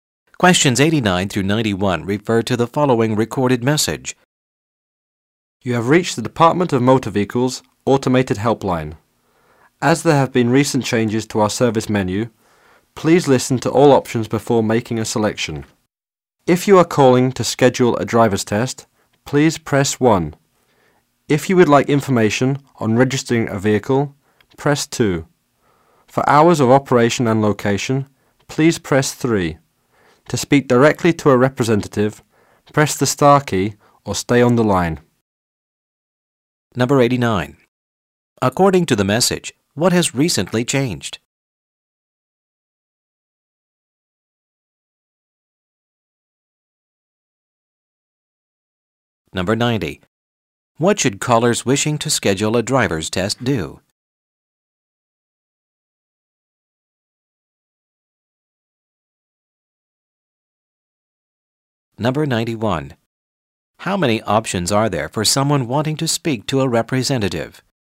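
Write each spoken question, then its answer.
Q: According to the message, what has recently changed?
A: The service menu

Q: What should callers wishing to schedule a driver's test do?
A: Press 1

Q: How many options are there for someone wanting to speak to a representative?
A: Two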